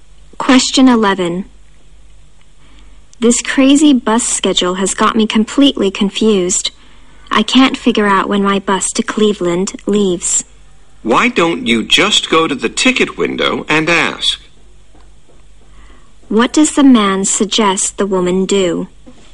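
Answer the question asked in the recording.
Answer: Go to the ticket window and ask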